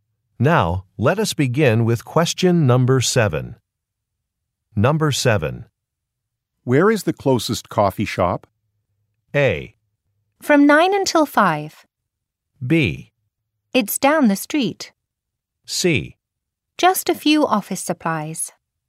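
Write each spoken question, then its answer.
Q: Where is the closest coffee shop?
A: B: It's down the street.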